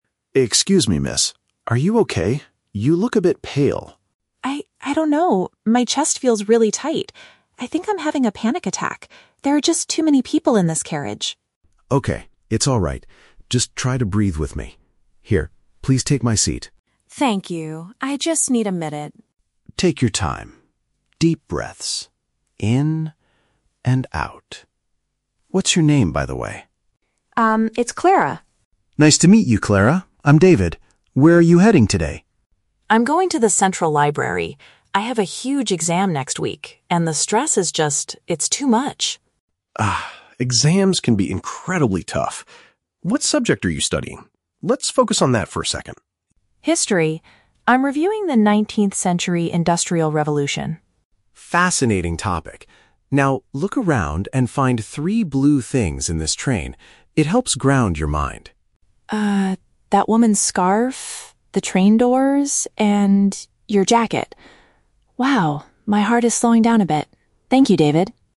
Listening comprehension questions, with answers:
Listen to the conversation between two passengers on a train and choose the correct answer (A, B, or C) for each question.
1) What is the main reason Clara is feeling so overwhelmed?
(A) She is worried about an important test.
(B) She lost her history textbook.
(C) She doesn't like traveling by train.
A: (A) She is worried about an important test.

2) What is the first thing David does to help Clara?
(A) He gives her some water to drink.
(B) He offers her his place to sit.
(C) He asks her about her favorite color.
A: (B) He offers her his place to sit.

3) Why does David ask Clara to find three blue objects?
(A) To test her knowledge of history.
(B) To help her shift her attention.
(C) To show her his new jacket.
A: (B) To help her shift her attention.

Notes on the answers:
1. The Key: Clara says, "I have a huge exam next week, and the stress is just... it's too much." (huge exam = important test). The Trap (B): Clara mentions she is studying "History", but she never says she lost her book. Plausible but not mentioned (C): She mentions there are "too many people in this carriage", but she doesn't state that she hates traveling by train in general.
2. The Key: When David notices Clara is unwell, he says, "Here, please take my seat" (take my seat = offers his place to sit). The Trap (C): David asks her to find three "blue" things later in the conversation, but he doesn't ask about her favorite color, and it's not the first thing he does. Plausible but not mentioned (A): Giving water is a common way to help someone, but David does not do this in the audio.
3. The Key: David tells Clara to find blue things because "It helps ground your mind." This means he wants to distract her from her panic and help her focus on the present environment (shift her attention). The Trap (A): They talked about her "History" studies right before this, so students might connect the two ideas incorrectly. The Trap (C): Clara mentions David's "jacket" is blue, but David didn't play this game just to show off his clothes.

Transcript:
David: Excuse me, miss? Are you okay? You look a bit pale.
Clara: I... I don't know. My chest feels really tight. I think I'm having a panic attack. There are just too many people in this carriage.
David: Okay, it's alright. Just try to breathe with me. Here, please take my seat.
Clara: Thank you. I just need a minute.
David: Take your time. Deep breaths. In... and out. What's your name, by the way?
Clara: Um, it's Clara.
David: Nice to meet you, Clara. I'm David. Where are you heading today?
Clara: I'm going to the central library. I have a huge exam next week, and the stress is just... it's too much.
David: Ah, exams can be incredibly tough. What subject are you studying? Let's focus on that for a second.
Clara: History. I'm reviewing the 19th-century industrial revolution.
David: Fascinating topic. Now, look around and find three blue things in this train. It helps ground your mind.
that woman's scarf, the train doors, and... your jacket. Wow, my heart is slowing down a bit. Thank you, David.

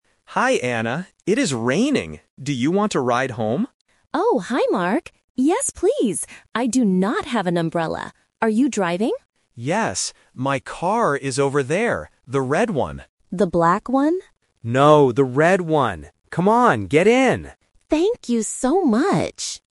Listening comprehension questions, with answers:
Listen to the conversation and choose the correct answer (A, B, or C).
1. What is the weather like?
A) It is sunny.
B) It is raining.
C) It is snowing.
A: B) It is raining.

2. How will Anna go home?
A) By bus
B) By taxi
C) By car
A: C) By car

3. What color is Mark's car?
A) Red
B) Black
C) Blue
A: A) Red

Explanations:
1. Mark says clearly at the beginning, "It is raining." Options (A) and (C) are just plausible weather conditions but are not mentioned in the audio.
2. Mark offers her a ride and says, "My car is over there." Anna gets in his car. Options (A) and (B) are distractors related to transport but are not mentioned.
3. Mark states that his car is "The red one." Option (B) is a trap because Anna asks, "The black one?", but Mark immediately corrects her by saying, "No, the red one." Option (C) is not mentioned.

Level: A1

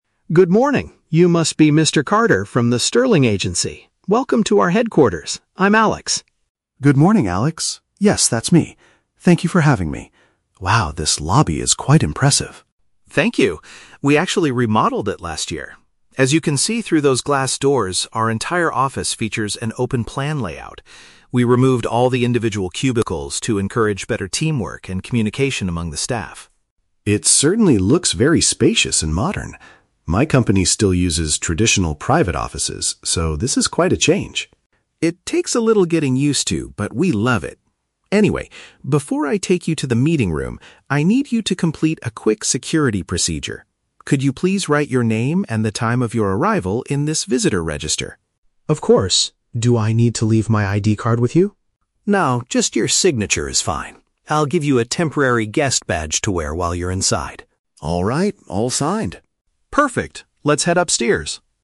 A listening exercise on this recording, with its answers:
Listen to the conversation between a company employee and a client, then choose the correct answer (A, B, or C).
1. Why did the company change to an open-plan layout?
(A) To make the reception area look more impressive to visitors.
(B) To improve collaboration and talking between employees.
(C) To save money on building traditional private offices.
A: (B) To improve collaboration and talking between employees.

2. How does Mr. Carter describe his own company's workspace?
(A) It consists of separate, closed workspaces.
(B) It has a spacious and modern open-plan design.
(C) It is currently undergoing a major remodeling project.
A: (A) It consists of separate, closed workspaces.

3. What is Mr. Carter required to do at the reception desk?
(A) Hand over his personal identification card to the employee.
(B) Put down his personal details in a logbook.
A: (B) Put down his personal details in a logbook.

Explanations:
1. Alex states that they removed cubicles to "encourage better teamwork and communication among the staff". Option B uses synonyms ("improve collaboration and talking") to express this exact idea.
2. Mr. Carter mentions that his company still uses "traditional private offices". Option A accurately paraphrases this

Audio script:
Alex: Good morning! You must be Mr. Carter from the Sterling Agency. Welcome to our headquarters! I'm Alex.
Mr. Carter: Good morning, Alex. Yes, that's me. Thank you for having me. Wow, this lobby is quite impressive.
Alex: Thank you! We actually remodeled it last year. As you can see through those glass doors, our entire office features an open-plan layout. We removed all the individual cubicles to encourage better teamwork and communication among the staff.
Mr. Carter: It certainly looks very spacious and modern. My company still uses traditional private offices, so this is quite a change.
Alex: It takes a little getting used to, but we love it. Anyway, before I take you to the meeting room, I need you to complete a quick security procedure. Could you please write your name and the time of your arrival in this visitor register?
Mr. Carter: Of course. Do I need to leave my ID card with you?
Alex: No, just your signature is fine. I'll give you a temporary guest badge to wear while you're inside.

